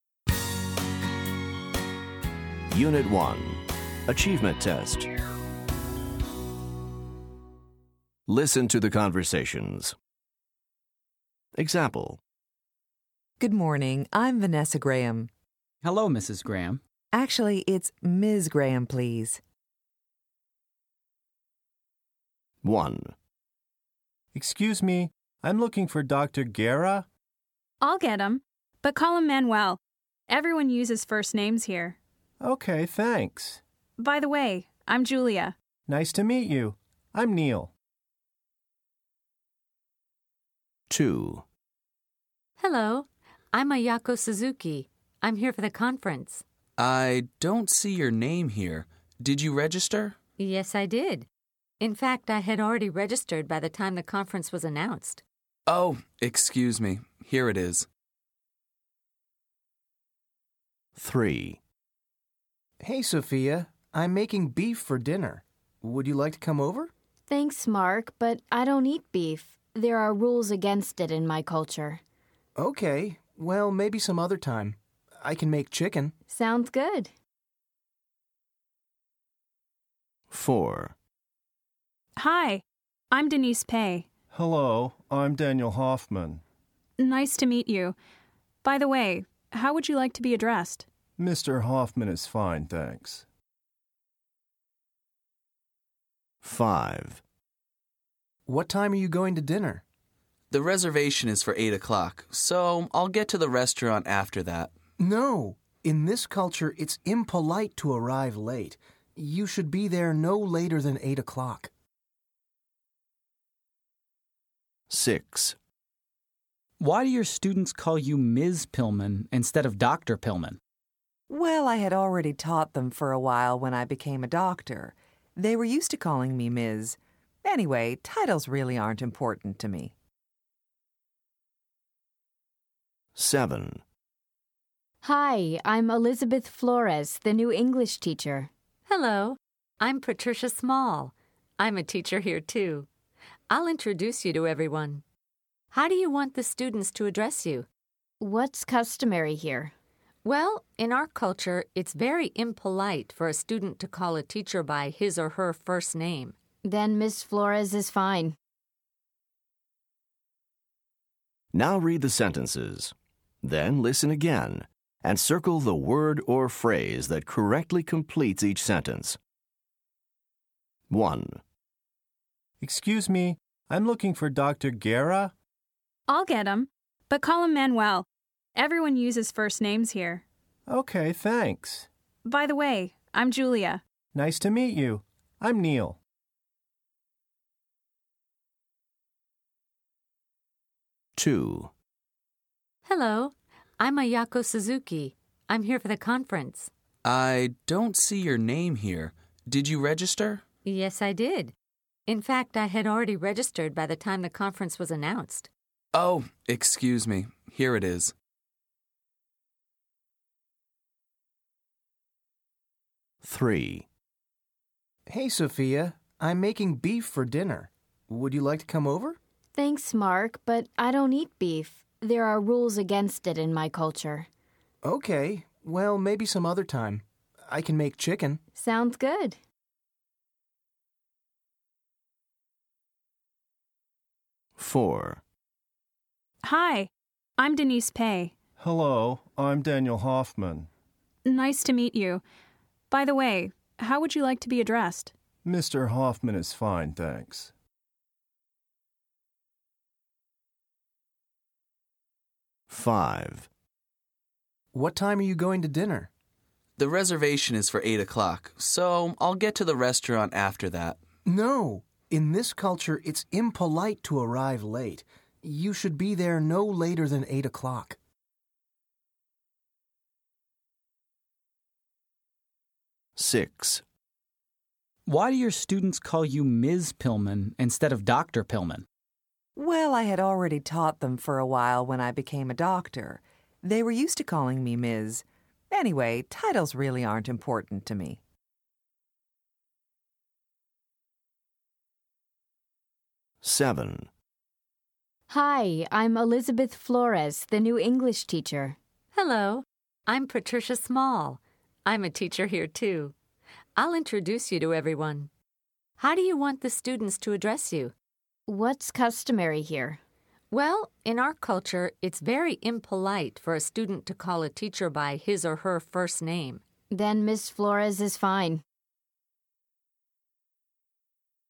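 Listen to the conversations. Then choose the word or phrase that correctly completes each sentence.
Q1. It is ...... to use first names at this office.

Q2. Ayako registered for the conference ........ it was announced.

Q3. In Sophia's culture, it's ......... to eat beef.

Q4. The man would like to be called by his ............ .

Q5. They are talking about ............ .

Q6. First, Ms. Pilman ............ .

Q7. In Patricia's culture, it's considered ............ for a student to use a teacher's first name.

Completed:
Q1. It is customary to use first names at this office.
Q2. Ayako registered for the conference before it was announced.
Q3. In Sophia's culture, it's taboo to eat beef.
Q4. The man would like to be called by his title and last name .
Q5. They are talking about punctuality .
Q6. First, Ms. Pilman taught her students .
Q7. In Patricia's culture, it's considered impolite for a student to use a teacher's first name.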